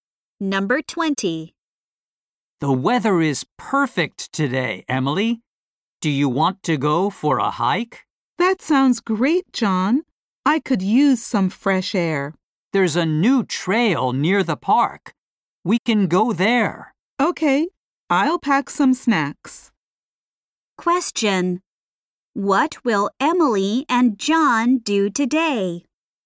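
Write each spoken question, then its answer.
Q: What will Emily and John do today?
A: Go for a hike on the new trail near the park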